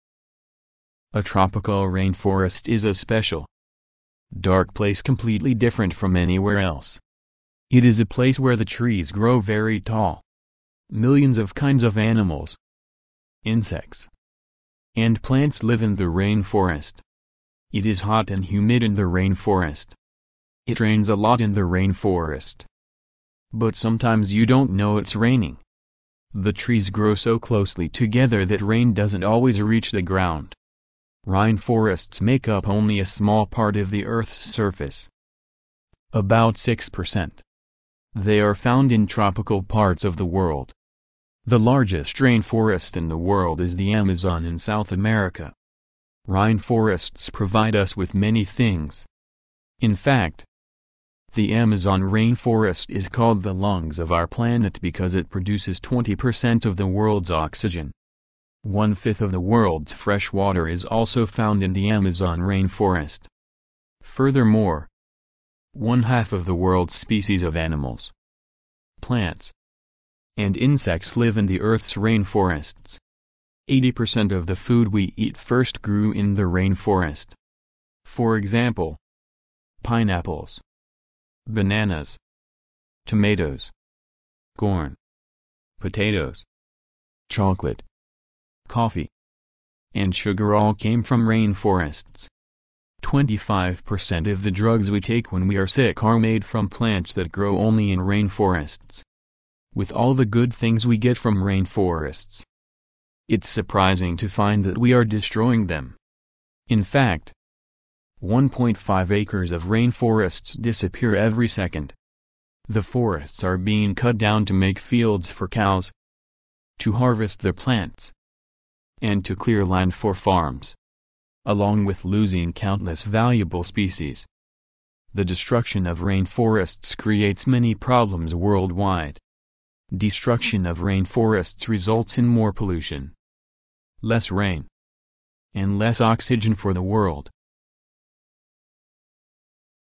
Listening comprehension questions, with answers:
Listen to the passage. For questions 26—30, complete the notes using no more than three words for each blank.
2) Also, many of the 2 we use to fight disease are made from rainforest plants.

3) Unfortunately, rainforests are 3 .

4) They are being 4 so that farmers can grow crops or raise cattle.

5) Problems resulting from the destruction of rainforests include more 5 , less oxygen, and fewer species of animals.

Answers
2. drugs
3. disappearing
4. cut down
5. pollution

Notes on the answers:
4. 听力材料提到"The forests are being cut down to make fields for cows, to harvest the plants, and to clear land for farms",即为了建立奶牛场,收割植物以及为农场开垦土地,森林正在被砍伐。因此本空填cut down。

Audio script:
[听力原文] A tropical rainforest is a special, dark place completely different from anywhere else. It is a place where the trees grow very tall. Millions of kinds of animals, insects, and plants live in the rainforest. It is hot and humid in the rainforest. It rains a lot in the rainforest, but sometimes you don't know it's raining. The trees grow so closely together that rain doesn't always reach the ground. Rainforests make up only a small part of the Earth's surface, about six percent. They are found in tropical parts of the world. The largest rainforest in the world is the Amazon in South America. Rainforests provide us with many things. In fact, the Amazon Rainforest is called the "lungs of our planet" because it produces twenty percent of the world's oxygen. One fifth of the world's fresh water is also found in the Amazon Rainforest. Furthermore, one half of the world's species of animals, plants, and insects live in the Earth's rainforests. Eighty percent of the food we eat first grew in the rainforest. For example, pineapples, bananas, tomatoes, corn, potatoes, chocolate, coffee, and sugar all came from rainforests. Twenty-five percent of the drugs we take when we are sick are made from plants that grow only in rainforests. With all the good things we get from rainforests, it's surprising to find that we are destroying them. In fact, 1.5 acres of rainforests disappear every second. The forests are being cut down to make fields for cows, to harvest the plants, and to clear land for farms. Along with losing countless valuable species, the destruction of rainforests creates many problems worldwide. Destruction of rainforests results in more pollution, less rain, and less oxygen for the world.